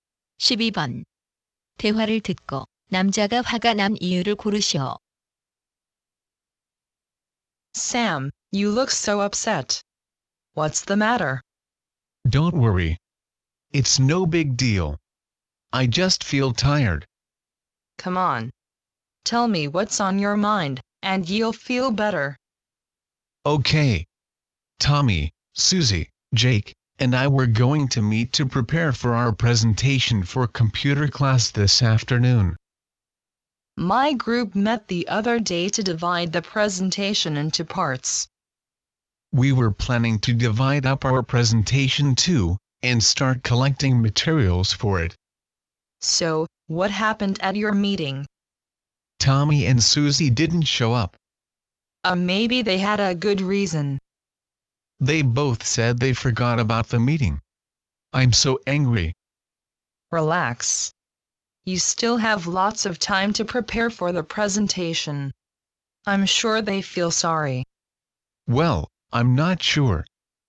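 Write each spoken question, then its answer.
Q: 대화를 듣고 남자가 화가 난 이유를 고르시오.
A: 조원들이 회의를 잊고 나오지 않아서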